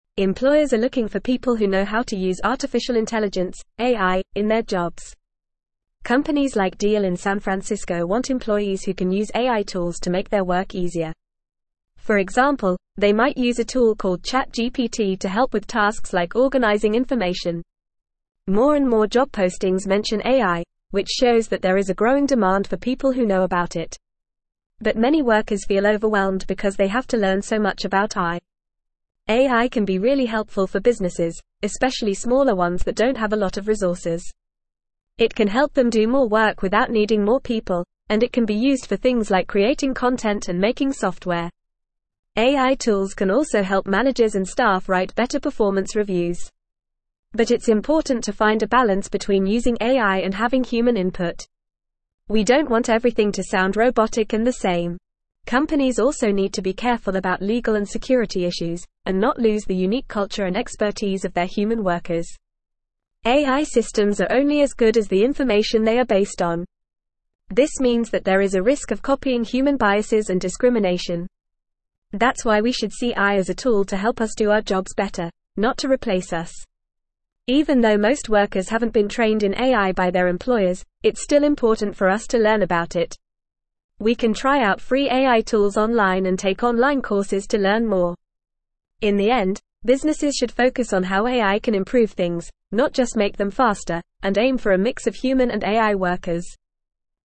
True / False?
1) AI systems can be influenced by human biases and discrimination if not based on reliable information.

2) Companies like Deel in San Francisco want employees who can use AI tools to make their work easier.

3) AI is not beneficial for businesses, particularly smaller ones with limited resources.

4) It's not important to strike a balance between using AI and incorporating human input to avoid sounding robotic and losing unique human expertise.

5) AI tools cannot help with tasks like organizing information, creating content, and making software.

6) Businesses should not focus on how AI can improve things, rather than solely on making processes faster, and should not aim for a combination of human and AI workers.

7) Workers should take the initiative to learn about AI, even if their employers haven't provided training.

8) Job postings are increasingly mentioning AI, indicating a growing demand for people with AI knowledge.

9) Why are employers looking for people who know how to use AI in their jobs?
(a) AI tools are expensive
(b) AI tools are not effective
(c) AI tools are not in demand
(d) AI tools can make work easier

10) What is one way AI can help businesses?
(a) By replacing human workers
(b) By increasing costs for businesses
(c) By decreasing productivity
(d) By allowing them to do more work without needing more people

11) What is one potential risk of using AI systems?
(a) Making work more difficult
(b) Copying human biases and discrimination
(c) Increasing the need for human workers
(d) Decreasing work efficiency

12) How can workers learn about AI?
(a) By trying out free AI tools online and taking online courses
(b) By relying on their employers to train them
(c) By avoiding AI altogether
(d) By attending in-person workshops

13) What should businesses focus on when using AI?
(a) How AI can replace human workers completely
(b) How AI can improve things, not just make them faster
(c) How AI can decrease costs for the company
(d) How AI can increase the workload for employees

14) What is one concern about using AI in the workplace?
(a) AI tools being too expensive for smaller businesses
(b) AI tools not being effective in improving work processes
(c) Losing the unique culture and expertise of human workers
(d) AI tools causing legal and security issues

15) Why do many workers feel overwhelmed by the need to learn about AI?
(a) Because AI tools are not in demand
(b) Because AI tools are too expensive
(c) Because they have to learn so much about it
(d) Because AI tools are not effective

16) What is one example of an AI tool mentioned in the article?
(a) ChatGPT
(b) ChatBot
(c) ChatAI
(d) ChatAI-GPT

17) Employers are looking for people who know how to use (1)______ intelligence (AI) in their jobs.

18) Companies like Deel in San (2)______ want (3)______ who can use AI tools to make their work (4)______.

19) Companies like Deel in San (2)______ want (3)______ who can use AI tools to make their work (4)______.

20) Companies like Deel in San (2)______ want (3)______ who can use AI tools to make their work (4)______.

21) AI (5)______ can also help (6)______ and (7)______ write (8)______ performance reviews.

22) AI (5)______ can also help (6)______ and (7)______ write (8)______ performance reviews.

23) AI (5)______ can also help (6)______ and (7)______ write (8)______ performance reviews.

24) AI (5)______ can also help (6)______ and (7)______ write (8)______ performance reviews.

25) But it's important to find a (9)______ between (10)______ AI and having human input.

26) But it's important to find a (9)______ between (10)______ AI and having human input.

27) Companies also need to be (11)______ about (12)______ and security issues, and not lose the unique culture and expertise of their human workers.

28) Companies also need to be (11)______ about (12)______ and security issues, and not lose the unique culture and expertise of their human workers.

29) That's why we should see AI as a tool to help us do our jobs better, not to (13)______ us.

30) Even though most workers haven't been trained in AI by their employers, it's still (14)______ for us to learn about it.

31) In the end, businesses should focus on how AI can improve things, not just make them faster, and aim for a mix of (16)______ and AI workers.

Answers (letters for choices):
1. True
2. True
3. False
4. False
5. False
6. False
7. True
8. True
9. d
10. d
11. b
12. a
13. b
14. c
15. c
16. a
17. artificial
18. Francisco
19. employees
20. easier
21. tools
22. managers
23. staff
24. better
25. balance
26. using
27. careful
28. legal
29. replace
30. important
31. human

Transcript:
Employers are looking for people who know how to use artificial intelligence (AI) in their jobs. For example, they might use a tool called ChatGPT to help with tasks like organizing information. More and more job postings mention AI, which shows that there is a growing demand for people who know about it. But many workers feel overwhelmed because they have to learn so much about AI.
AI can be really helpful for businesses, especially smaller ones that don't have a lot of resources. It can help them do more work without needing more people, and it can be used for things like creating content and making software. AI tools can also help managers and staff write better performance reviews. But it's important to find a balance between using AI and having human input. We don't want everything to sound robotic and the same. Companies also need to be careful about legal and security issues, and not lose the unique culture and expertise of their human workers.
AI systems are only as good as the information they are based on. This means that there is a risk of copying human biases and discrimination. That's why we should see AI as a tool to help us do our jobs better, not to replace us. Even though most workers haven't been trained in AI by their employers, it's still important for us to learn about it. We can try out free AI tools online and take online courses to learn more. In the end, businesses should focus on how AI can improve things, not just make them faster, and aim for a mix of human and AI workers.

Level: Level 3